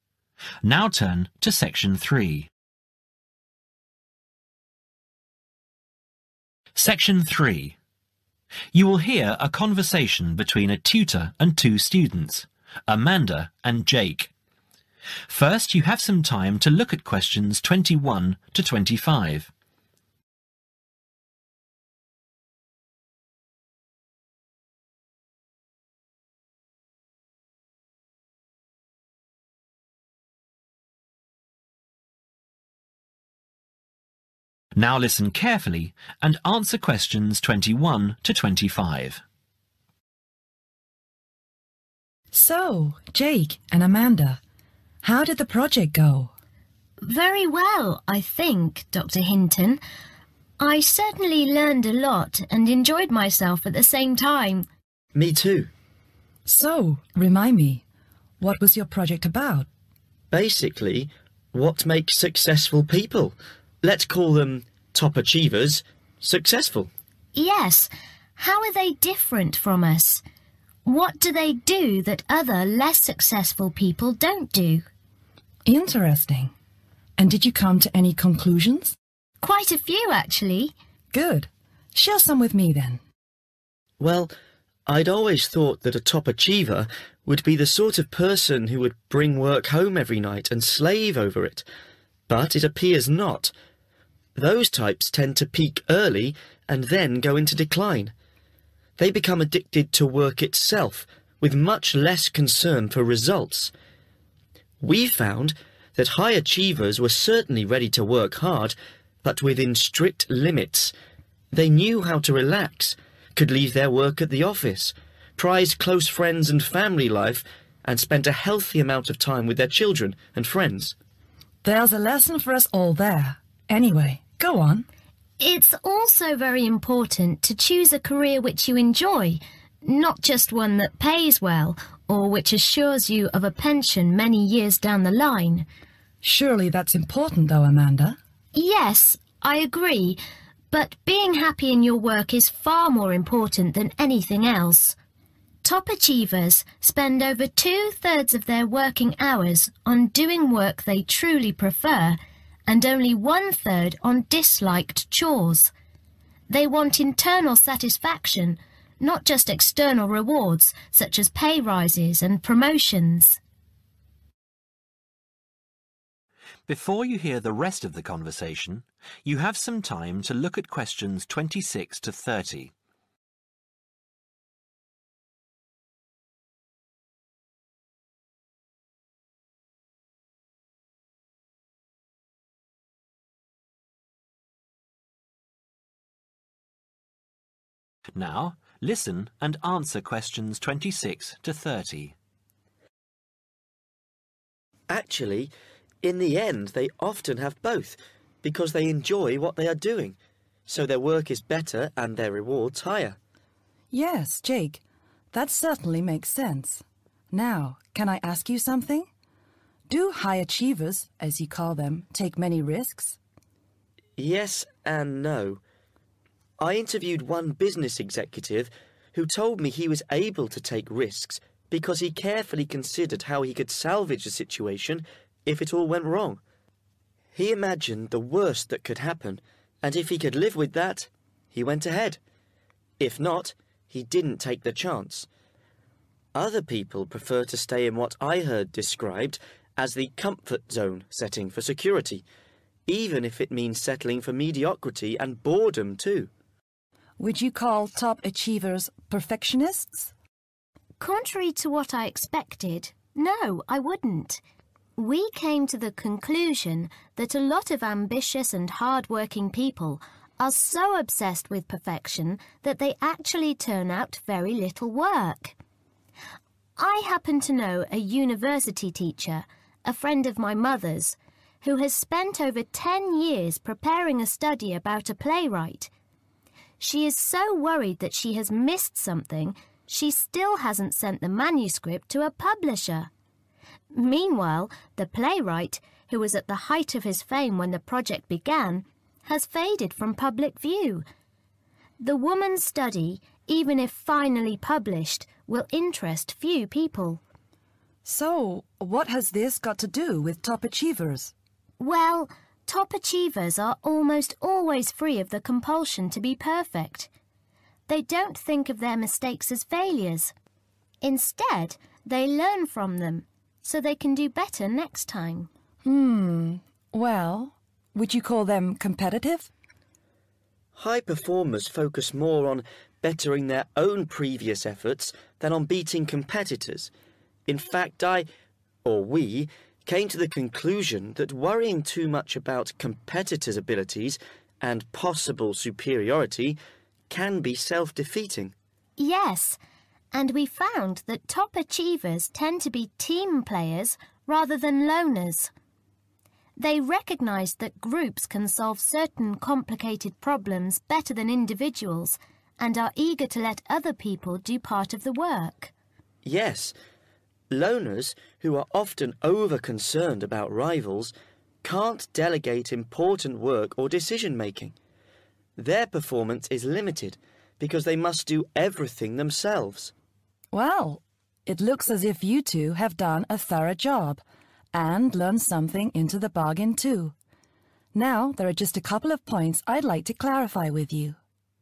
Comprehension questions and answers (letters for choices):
Complete the summary below. Write NO MORE THAN THREE WORDS AND/ OR A NUMBER for each answer.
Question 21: Although it is thought that people who bring work home every night would be top achievers, they tend to peak early and then go into (21)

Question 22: High achievers work hard, but within (22)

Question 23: It is also important to choose (23) you enjoy.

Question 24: Top achievers spend over (24) of their working hours doing work they prefer.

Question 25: They want (25) not just external rewards.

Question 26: Top achievers take risks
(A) without worrying about the consequences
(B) only if they are assured of success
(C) even if they face possible failure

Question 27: Very often perfectionists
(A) turn out to be top achievers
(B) don't get many results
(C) are not hard working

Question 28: When top achievers make mistakes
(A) they ignore the fact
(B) they get angry with themselves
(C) they learn from the experience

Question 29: Top achievers tend to be people who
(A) work well with others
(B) prefer to work alone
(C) complicate matters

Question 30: Loners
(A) want to do everything themselves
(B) are free of the compulsion to be perfect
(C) take no notice of rivals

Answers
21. decline
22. strict limits
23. a career
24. two-thirds
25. internal satisfaction
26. C
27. B
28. C
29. A
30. A